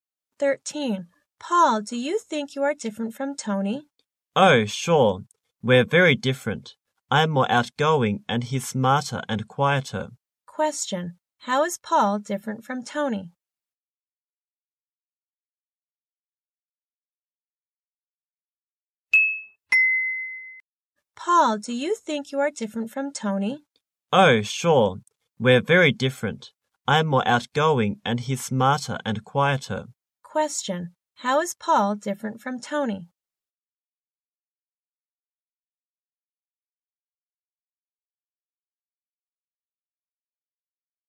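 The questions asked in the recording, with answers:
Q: How is Paul different from Tony?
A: Paul is more outgoing; Tony is smarter and quieter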